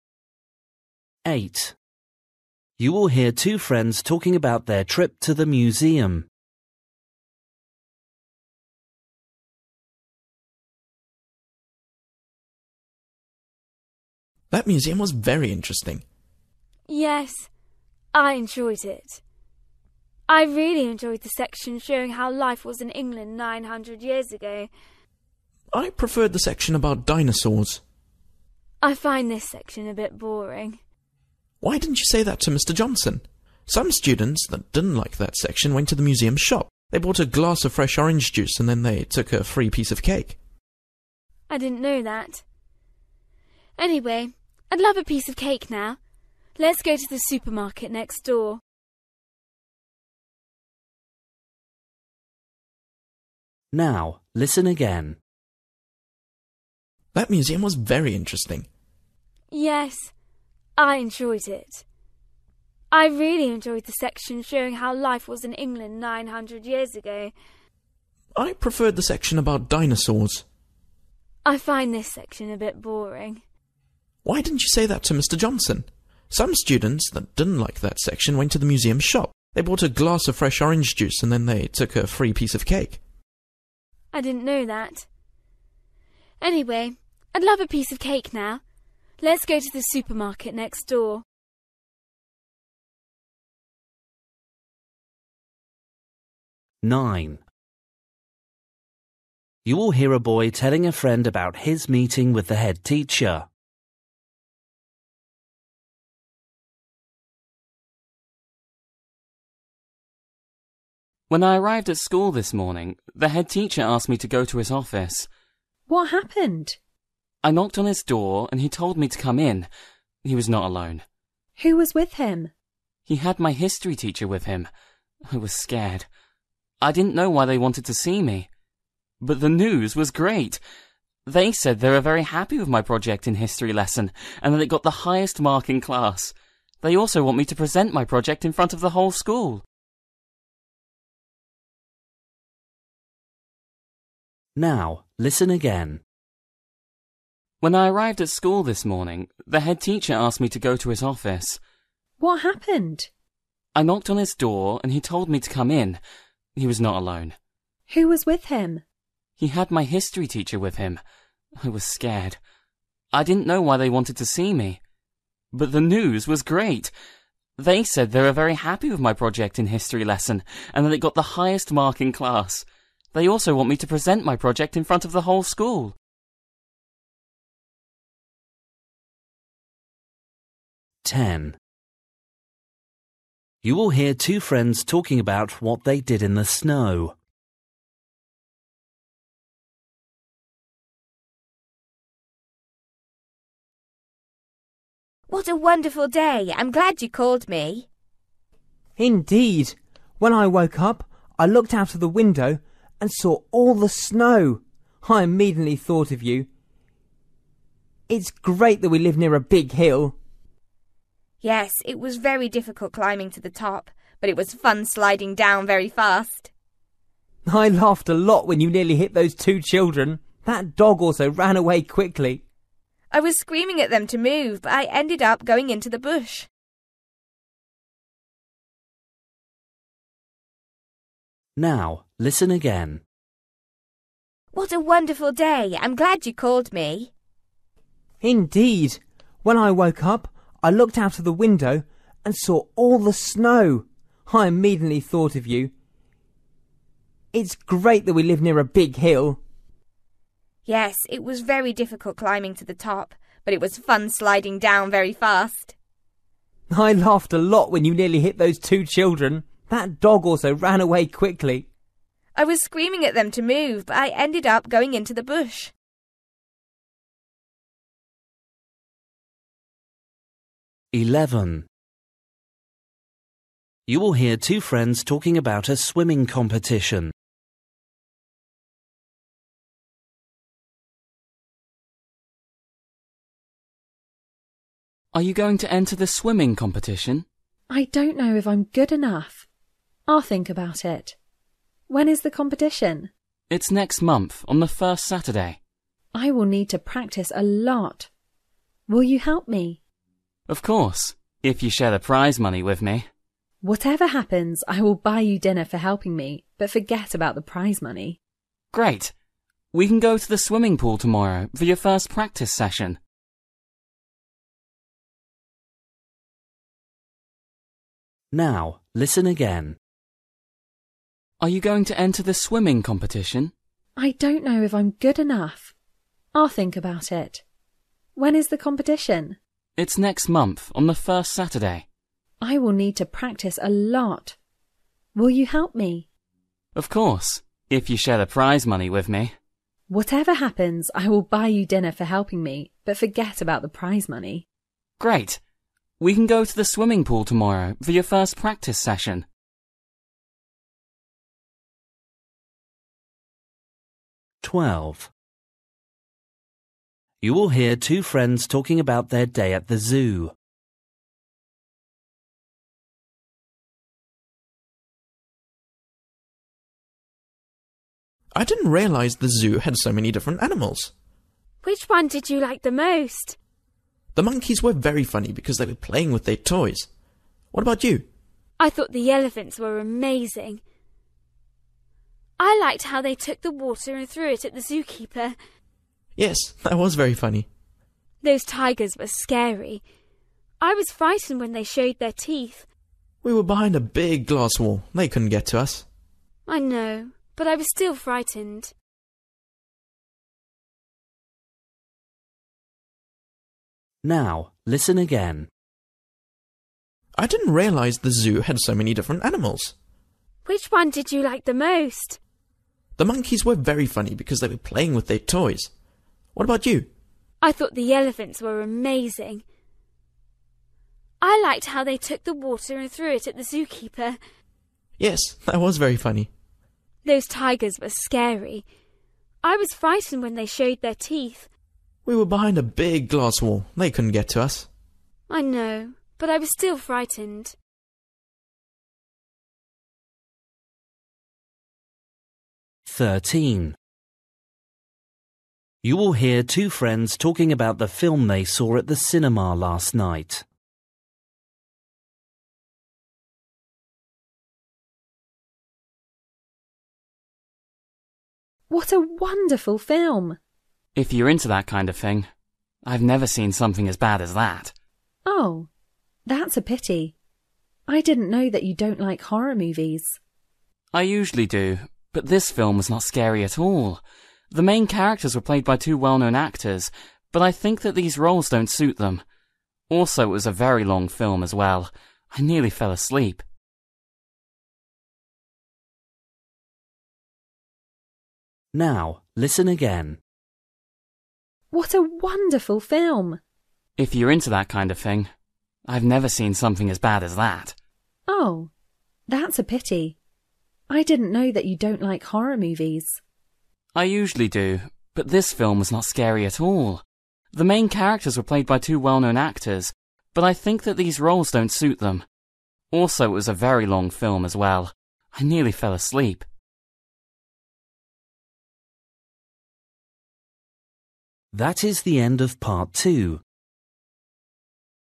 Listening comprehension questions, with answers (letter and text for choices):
For each question, choose the correct answer.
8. The girl isn't interested in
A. the way people lived a long time ago.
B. the dinosaurs section.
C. having anything to eat or drink.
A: B. the dinosaurs section.

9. The headteacher and the history teacher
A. were disappointed by the boy's project.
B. disagreed about the mark on the boy's project.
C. were excited with the boy's project.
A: C. were excited with the boy's project.

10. What did the girl crash into at the bottom of the hill?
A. two children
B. a bush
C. a dog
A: B. a bush

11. What will the girl do for the boy after the competition?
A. take him out to eat somewhere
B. share the prize with him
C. take him to the swimming pool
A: A. take him out to eat somewhere

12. What was the girl scared by?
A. the monkeys' toys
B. the water from the elephants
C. the tigers' teeth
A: C. the tigers' teeth

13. Why didn't the boy enjoy the film?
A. It was very frightening.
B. The acting was terrible.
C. It was too short.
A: B. The acting was terrible.

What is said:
8 You will hear two friends talking about their trip to the museum.
Boy: That museum was very interesting.
Girl: Yes, I enjoyed it. I really enjoyed the section showing how life was in England nine hundred years ago.
Boy: I preferred the section about dinosaurs.
Girl: I find this section a bit boring.
Boy: Why didn't you say that to Mr Johnson? Some students that didn't like that section went to the museum's shop. They bought a glass of fresh orange juice and then they took a free piece of cake.
Girl: I didn't know that. Anyway I'd love a piece of cake now. Let's go to the supermarket next door.
9 You will hear a boy telling a friend about his meeting with the headteacher.
Boy: When I arrived at school this morning, the headteacher asked me to go to his office.
Girl: What happened?
Boy: I knocked on his door and he told me to come in. He was not alone.
Girl: Who was with him?
Boy: He had my history teacher with him I was scared. I didn't know why they wanted to see me. But the news was great! They said they were very happy with my project in history lesson and that it got the highest mark in class. They also want me to present my project in front of the whole school.
10 You will hear two friends talking about what they did in the snow.
Girl: What a wonderful day! I'm glad you called me.
Boy: Indeed! When I woke up, I looked out of the window and saw all the snow. I immediately thought of you. It's great that we live near the big hill.
Girl: Yes. It was very difficult climbing to the top, but it was fun sliding down very fast.
Boy: I laughed a lot when you nearly hit those two children. That dog also ran away quickly.
Girl: I was screaming at them to move but I ended up going into the bush.
Boy: Are you going to enter the swimming competition?
Girl: I don't know if I am good enough. I'll think about it. When is the competition?
Boy: It's next month on the first Saturday.
Girl: I will need to practise a lot. Will you help me?
Boy: Of course, if you share the prize money with me.
Girl: Whatever happens I will buy you dinner for helping me but forget about the prize money.
Boy: Great. We can go to the swimming pool tomorrow for your first practice session.
Boy: I didn't realise the zoo had so many different animals.
Girl: Which one did you like the most?
Boy: The monkeys were very funny because they were playing with their toys. What about you?
Girl: I thought the elephants were amazing. I liked how they took the water and threw it at the zookeeper.
Boy: Yes, that was very funny.
Girl: Those tigers were scary. I was frightened when they showed their teeth.
Boy: We were behind a big glass wall, they couldn't get to us.
Girl: I know but I was still frightened.
13 You will hear two friends talking about the film they saw at the cinema last night.
Boy: If you're into that kind of thing. I have never seen something as bad as that.
Girl: Oh. That's a pity. I didn't know that you don't like horror movies.
Boy: I usually do, but this film was not scary at all. The main characters were played by two well-known actors, but I think that these roles don't suit them. Also it was a very long film as well. I nearly fell asleep.

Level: PET (B1)